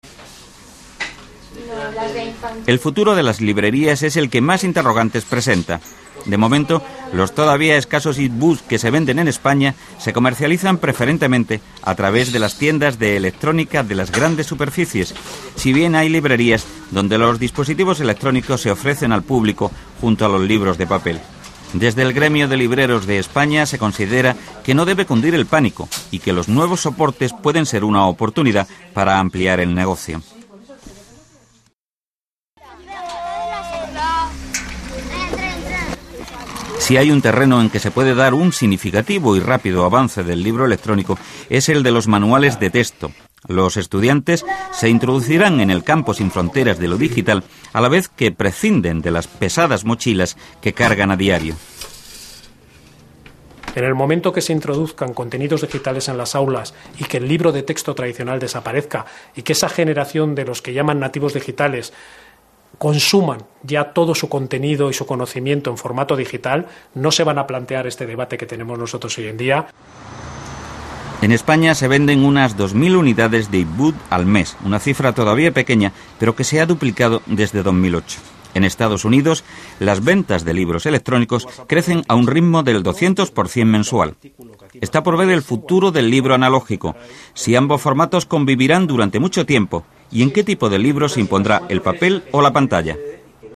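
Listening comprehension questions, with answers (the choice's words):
Escucha e indica qué frases se corresponden con la información del reportaje.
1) En España los e-book se venden en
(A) en tiendas de electrónica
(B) en librerías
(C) en tiendas de electrónica y librerías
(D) sólo en tiendas virtuales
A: en tiendas de electrónica y librerías

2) A los libreros la llegada de los libros electrónicos les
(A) da miedo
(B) parece una oportunidad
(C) deja indiferentes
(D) les obliga a hacer inversiones importantes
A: parece una oportunidad

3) En el aula una gran ventaja del e-book es que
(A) reduce los costes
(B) los contenidos didácticos pueden cambiarse rápidamente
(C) introduce a los alumnos en el mundo de los ordenadores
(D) reduce el peso de las mochilas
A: reduce el peso de las mochilas

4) En España las ventas de los e-book aumentan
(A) más que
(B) menos que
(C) tanto como en EE.UU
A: menos que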